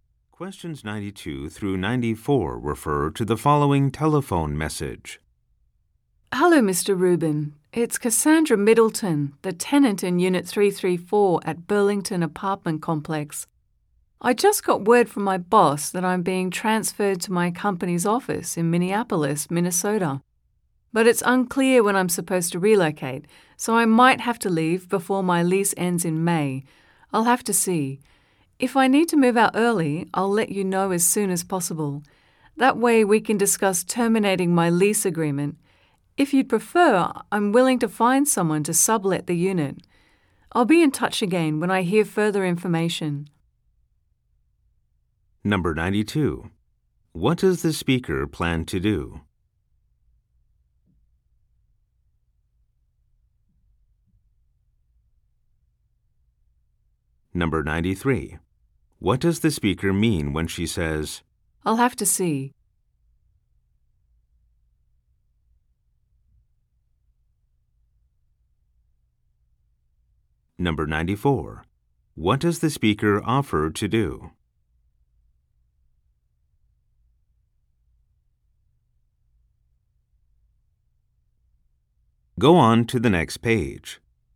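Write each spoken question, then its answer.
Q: What does the speaker plan to do?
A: Move to Minneapolis

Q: What does the speaker mean when she says, I'll have to see?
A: She doesn't know yet if she will have to leave early

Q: What does the speaker offer to do?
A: Find someone to sublet the unit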